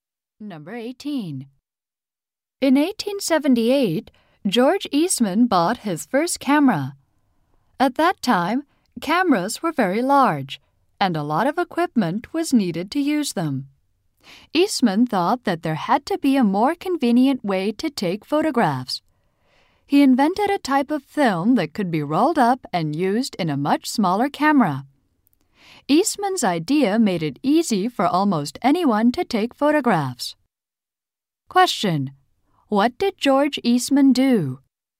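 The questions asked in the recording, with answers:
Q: What did George Eastman do?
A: He invented roll film for smaller cameras.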